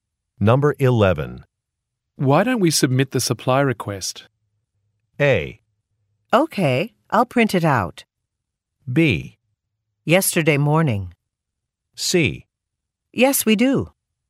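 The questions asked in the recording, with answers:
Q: Why don't we submit the supply request?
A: A: Okay, I'll print it out.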